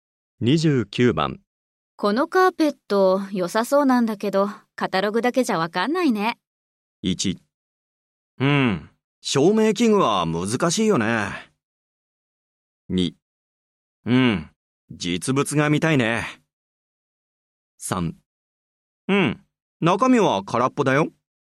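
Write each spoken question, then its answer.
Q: このカーペット、良さそうなんだけど、カタログだけじゃわかんないね。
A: 2: うん、実物が見たいね。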